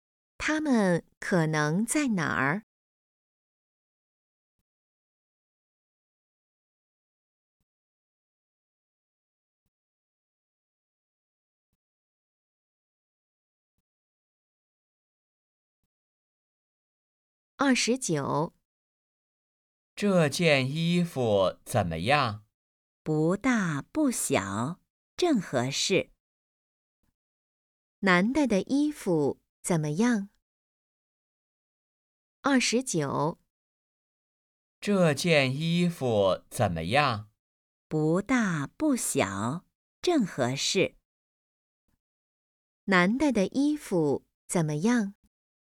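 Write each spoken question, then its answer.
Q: 男的的衣服怎么样?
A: 正合适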